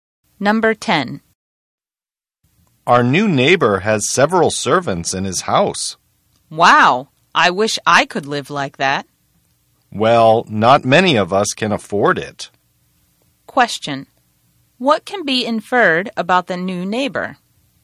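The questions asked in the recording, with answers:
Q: What can be inferred about the new neighbor?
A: He is wealthy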